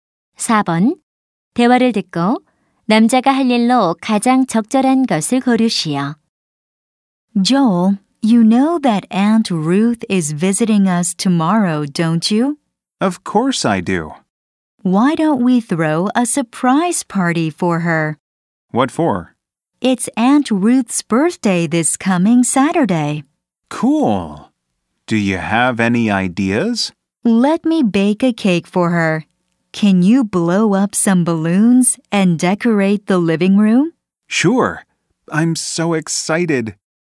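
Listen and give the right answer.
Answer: 풍선 불기와 거실 장식하기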